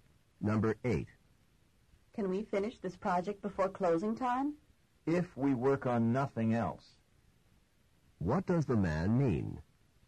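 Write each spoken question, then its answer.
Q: What does the man mean?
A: They can finish only if they work on nothing else.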